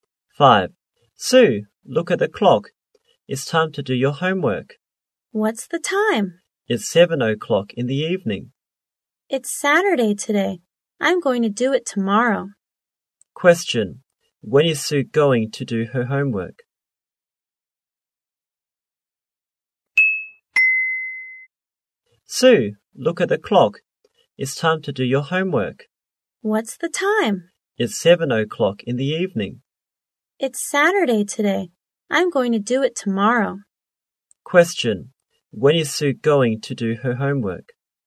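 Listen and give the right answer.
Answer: Tomorrow (Sunday)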